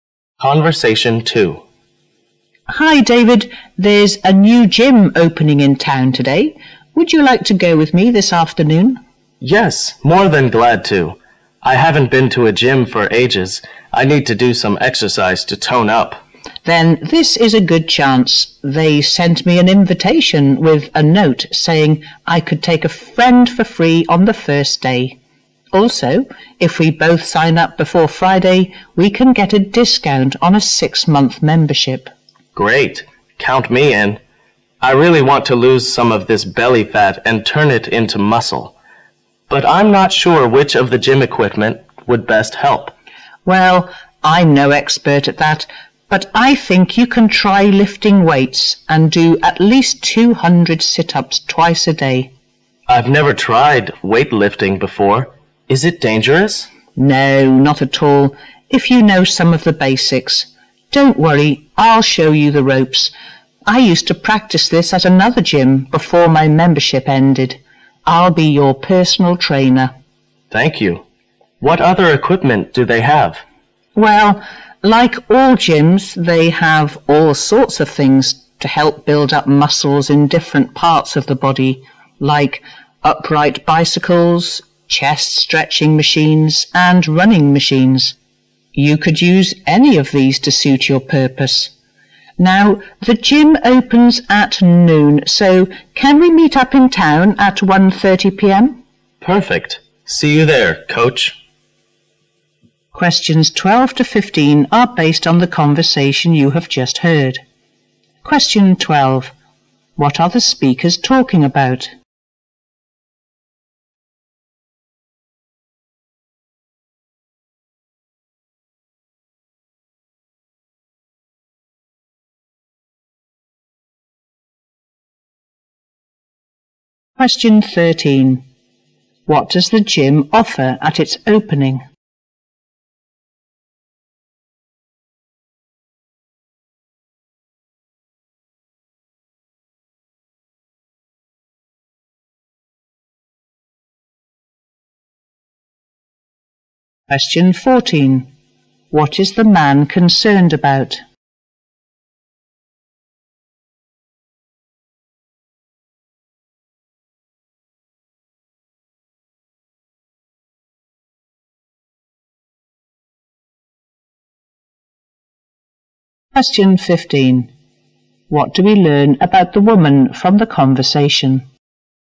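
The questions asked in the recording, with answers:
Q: What are the speakers talking about?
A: Going to a newly opened gym together

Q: What does the gym offer at its opening?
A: Free entry for a friend on the first day and a discount on a 6-month membership if signed up before Friday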